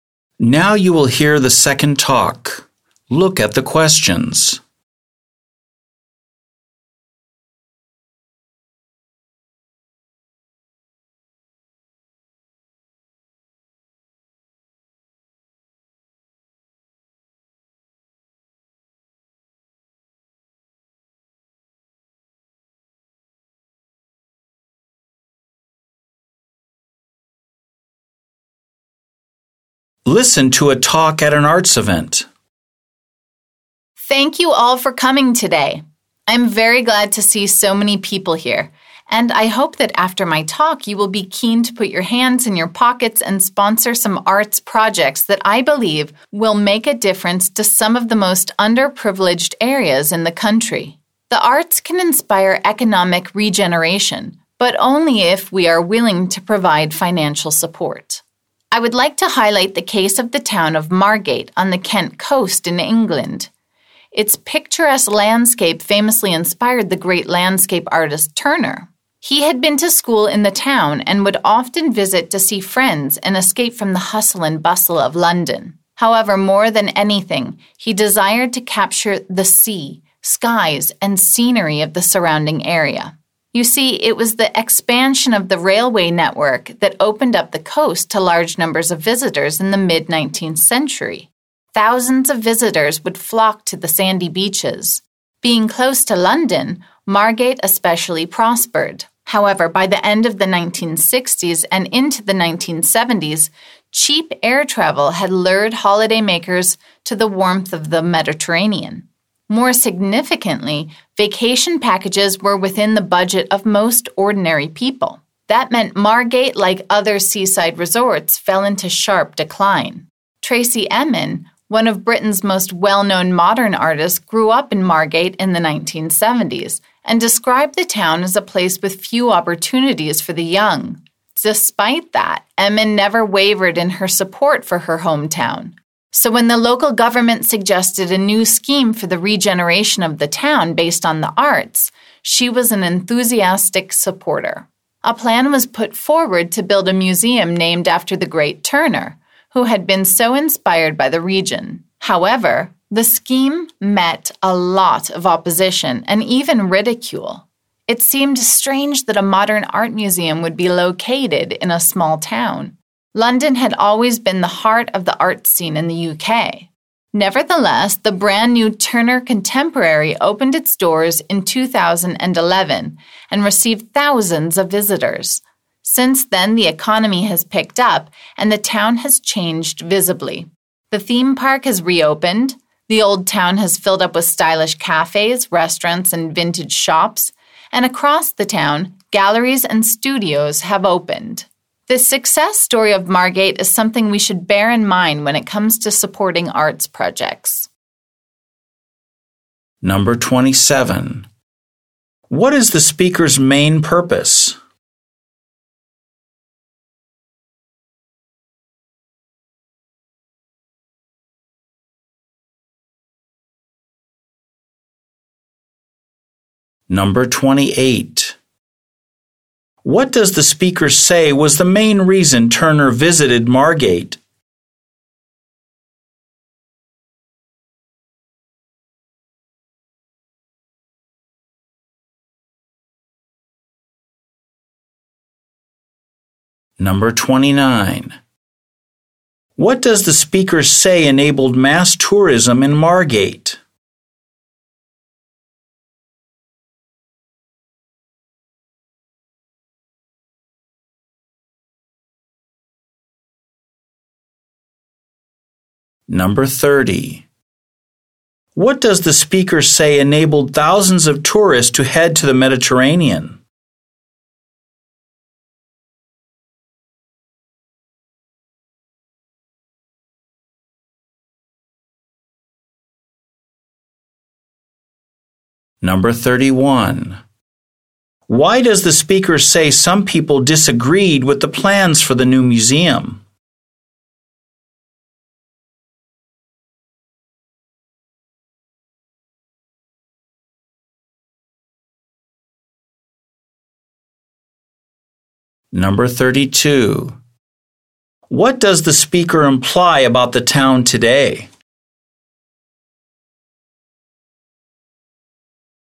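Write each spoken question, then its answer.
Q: What is the speaker's main purpose?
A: To encourage people to sponsor arts projects

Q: What does the speaker say was the main reason Turner visited Margate?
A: To capture the sea, skies and scenery

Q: What does the speaker say enabled mass tourism in Margate?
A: The expansion of the railway network

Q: What does the speaker say enabled thousands of tourists to head to the Mediterranean?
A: Cheap air travel and affordable vacation packages

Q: Why does the speaker say some people disagreed with the plans for the new museum?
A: It seemed strange to put a modern art museum in a small town rather than London

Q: What does the speaker imply about the town today?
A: It has been regenerated and its economy has improved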